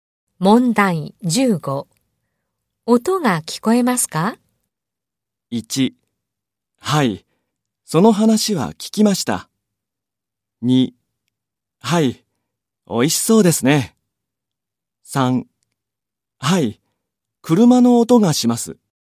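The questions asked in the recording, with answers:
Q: 音が聞こえますか?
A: 3: はい、車の音がします。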